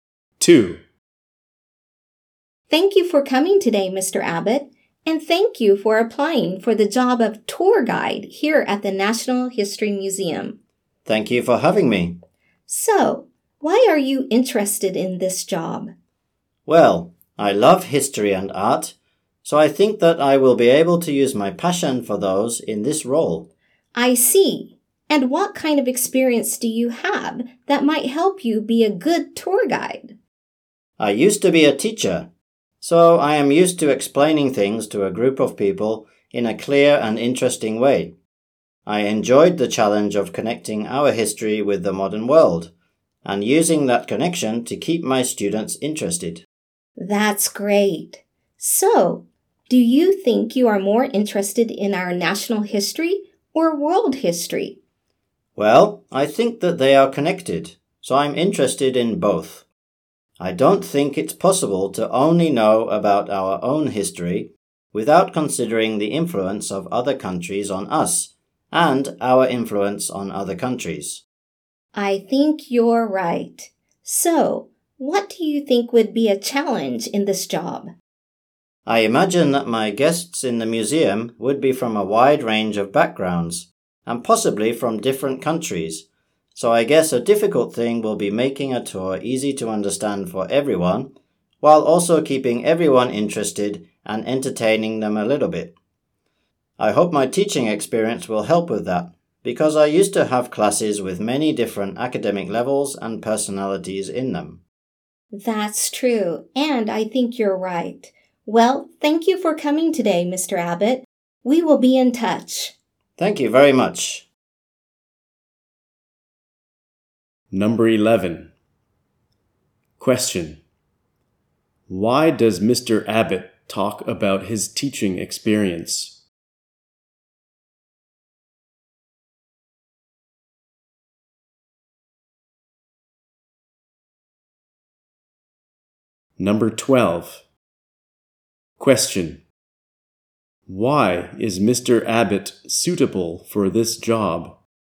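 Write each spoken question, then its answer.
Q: Why does Mr. Abbott talk about his teaching experience?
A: It shows he can explain things clearly and keep a varied group interested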